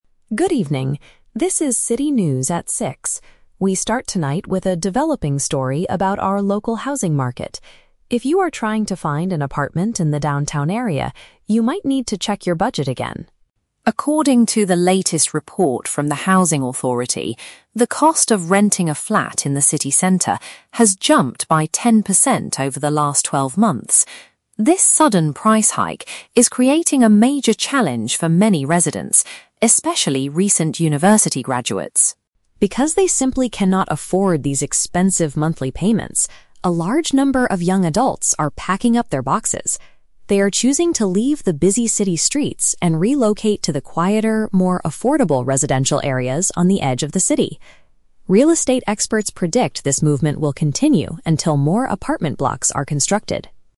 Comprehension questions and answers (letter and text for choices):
Listen to the local news report about the housing market. Choose the correct answer (A, B, or C) for each question.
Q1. What is the main topic of the news report?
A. The construction of new apartment blocks in the downtown area.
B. The recent increase in the cost of living in central apartments.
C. The rising number of university graduates finding jobs in the city.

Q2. How much has the rent changed recently?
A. It has gone down by ten percent over the last year.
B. It has grown by ten percent during the past year.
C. It has risen by ten percent since the previous month.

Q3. How are young people reacting to this financial situation?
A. They are moving to cheaper neighborhoods outside the main city.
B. They are sharing small apartments to save more money every month.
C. They are asking the Housing Authority for special financial support.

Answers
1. B. The recent increase in the cost of living in central apartments.
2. B. It has grown by ten percent during the past year.
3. A. They are moving to cheaper neighborhoods outside the main city.

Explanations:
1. The anchor states that "the cost of renting a flat in the city center has jumped." Option B perfectly paraphrases this: "increase" (jumped) in the "cost of living in central apartments" (cost of renting a flat in the city center). Why the traps are wrong: Option A is a trap; the audio mentions that the trend will continue "until more apartment blocks are constructed", meaning they are not built yet. Option C is a trap using the words "university graduates" and "city," but the news is about housing, not their employment.
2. The report says the cost has "jumped by ten percent over the last twelve months." "Jumped" means "grown" or increased, and "twelve months" is exactly "the past year". Why the traps are wrong: Option A is the exact opposite (saying it has gone down). Option C is a trap regarding the timeframe; it says "since the previous month" instead of the previous twelve months.
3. The anchor mentions that young adults are choosing to "leave the busy city streets and relocate to the quieter, more affordable residential areas on the edge of the city." Relocating to affordable areas on the edge of the city matches option A ("moving to cheaper neighborhoods outside the main city"). Why the traps are wrong: Options B and C are very logical and common real-world solutions for expensive housing, but they are completely made up and never mentioned in the audio script.

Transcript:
3 Correct Answer: A
News Anchor: Good evening, this is City News at six. We start tonight with a developing story about our local housing market. If you are trying to find an apartment in the downtown area, you might need to check your budget again.
According to the latest report from the Housing Authority, the cost of renting a flat in the city center has jumped by ten percent over the last twelve months. This sudden price hike is creating a major challenge for many residents, especially recent university graduates.
Because they simply cannot afford these expensive monthly payments, a large number of young adults are packing up their boxes. They are choosing to leave the busy city streets and relocate to the quieter, more affordable residential areas on the edge of the city. Real estate experts predict this movement will continue until more apartment blocks are constructed.